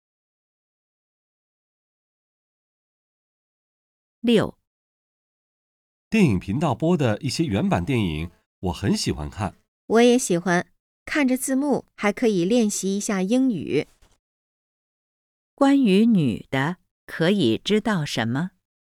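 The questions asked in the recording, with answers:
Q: 关于女的,可以知道什么?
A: 她喜欢看原版电影,借字幕练习英语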